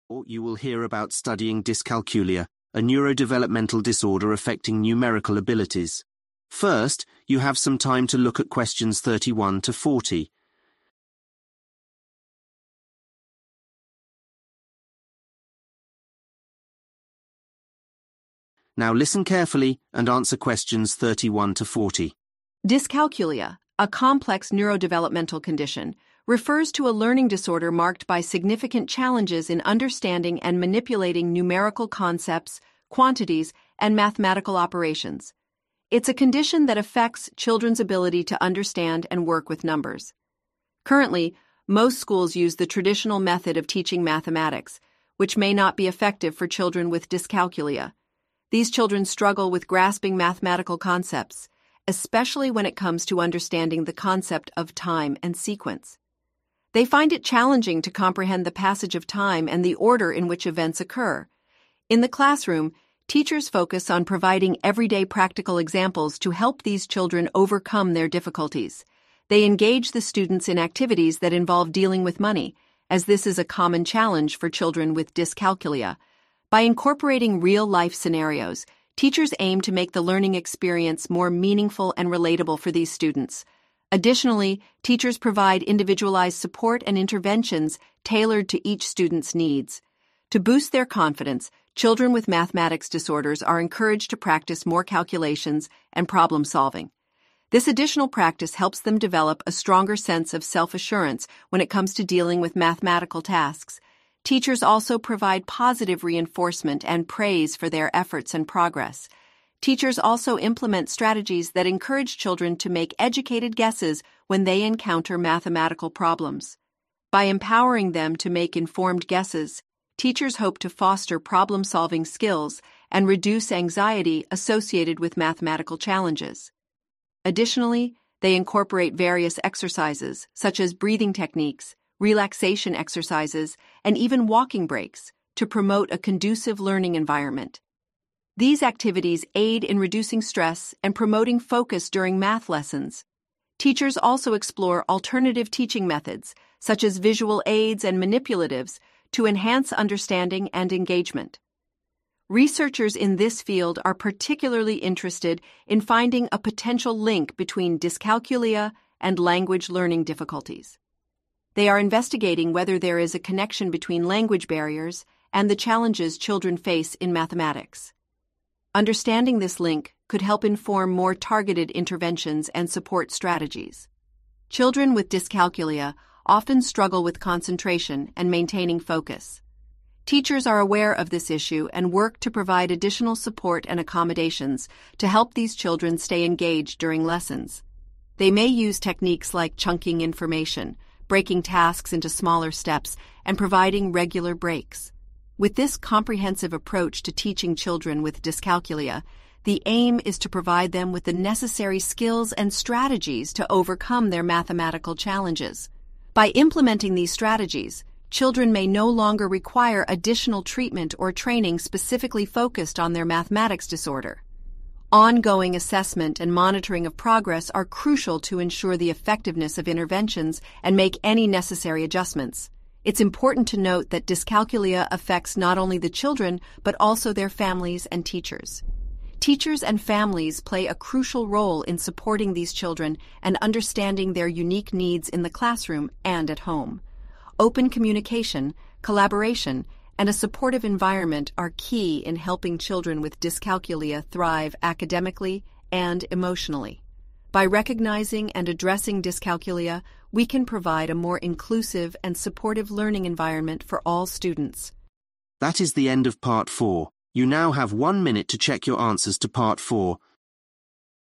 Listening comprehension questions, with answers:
Complete the notes below. Write ONE WORD ONLY for each answer.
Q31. Teaching applied in class: ____________ method of teaching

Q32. Children have difficulty learning the concept of ____________ and sequence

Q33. In the class, they are taught everyday practical examples, e.g. dealing with ____________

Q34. For children with mathematics disorder, extra calculation practice is used to develop more ____________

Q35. Teachers encourage them to solve problems by making educated ____________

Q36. Do exercises e.g. breathing, relaxation and ____________ breaks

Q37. Researchers are looking for a potential ____________ with language learning difficulties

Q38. Children are likely to have some problems with ____________ and focus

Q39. With this approach, children no longer need ____________ training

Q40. Dyscalculia affects the children and also their families and ____________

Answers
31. traditional
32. time
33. money
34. confidence
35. guesses
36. walking
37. link
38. concentration
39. additional
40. teachers